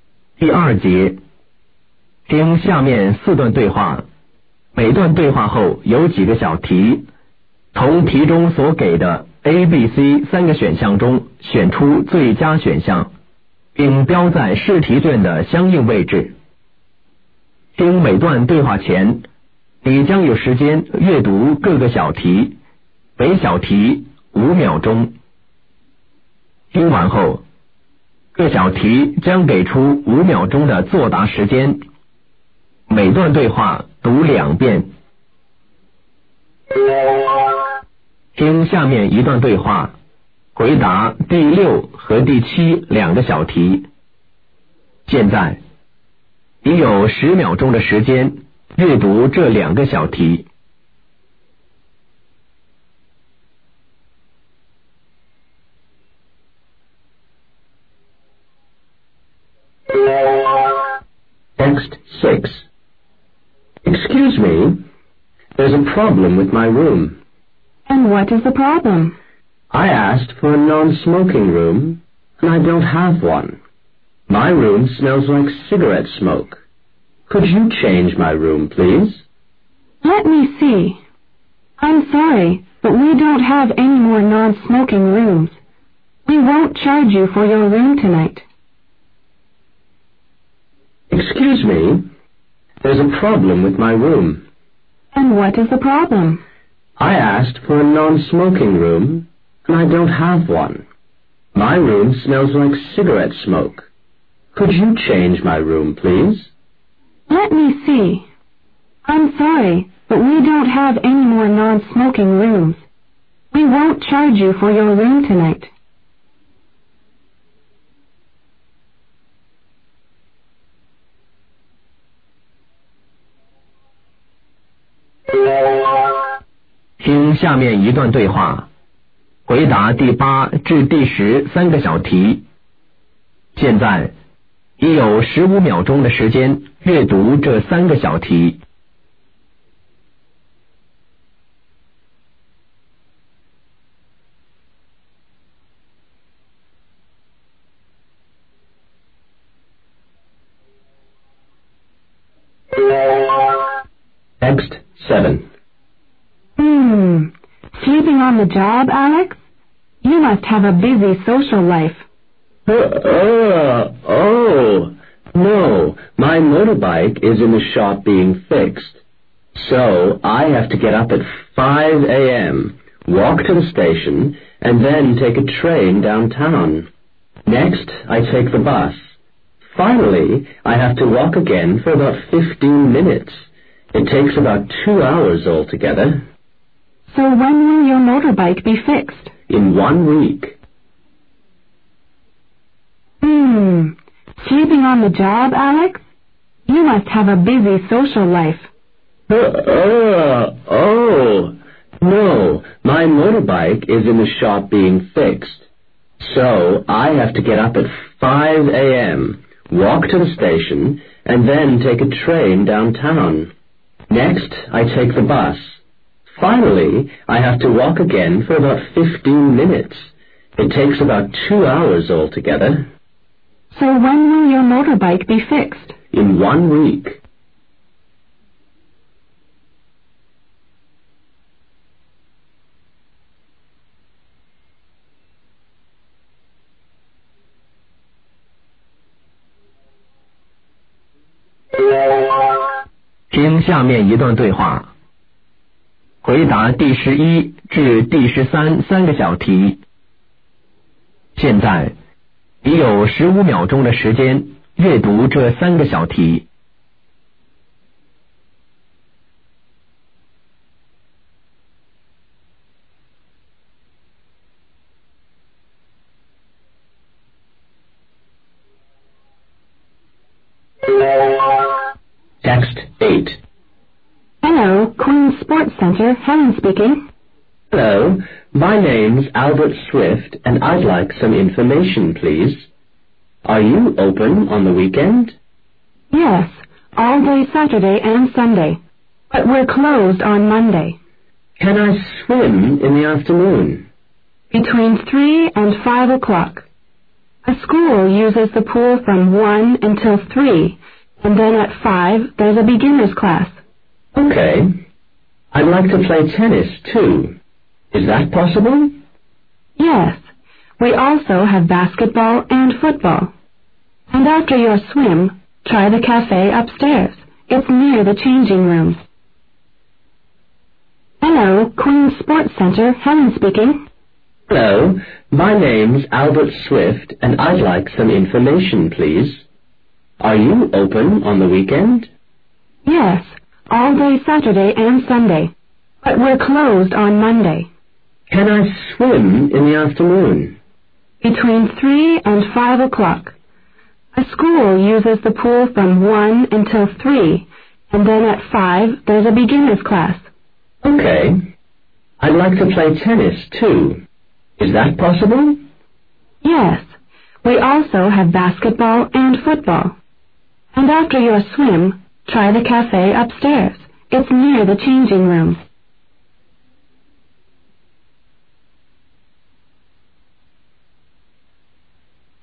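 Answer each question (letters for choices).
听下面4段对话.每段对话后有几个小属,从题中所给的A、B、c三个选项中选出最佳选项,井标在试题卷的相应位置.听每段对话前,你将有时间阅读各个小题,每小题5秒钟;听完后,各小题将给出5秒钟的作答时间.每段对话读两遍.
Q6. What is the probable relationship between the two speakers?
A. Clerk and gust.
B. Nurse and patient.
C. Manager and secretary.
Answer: A

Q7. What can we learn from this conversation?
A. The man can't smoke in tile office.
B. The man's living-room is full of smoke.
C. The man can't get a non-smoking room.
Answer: C

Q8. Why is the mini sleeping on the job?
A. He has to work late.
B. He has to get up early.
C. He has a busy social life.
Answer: B

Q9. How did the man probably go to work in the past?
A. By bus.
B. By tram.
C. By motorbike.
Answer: C

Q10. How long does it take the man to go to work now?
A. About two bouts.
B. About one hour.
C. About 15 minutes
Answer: A

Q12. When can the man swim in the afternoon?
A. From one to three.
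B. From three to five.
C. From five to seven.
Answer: B

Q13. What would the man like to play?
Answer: Tennis.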